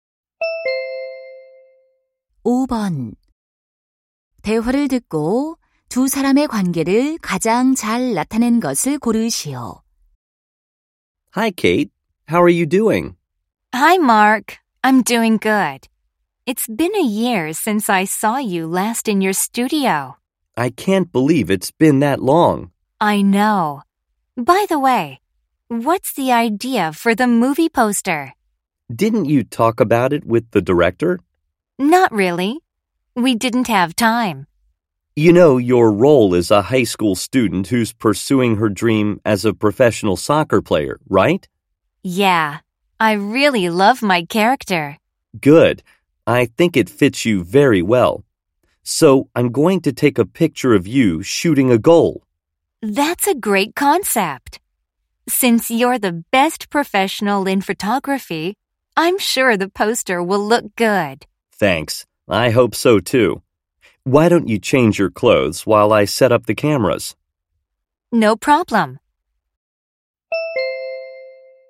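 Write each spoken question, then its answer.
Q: 대화를 듣고 두 사람의 관계를 가장 잘 나타낸 것을 고르시오.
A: 배우 - 사진작가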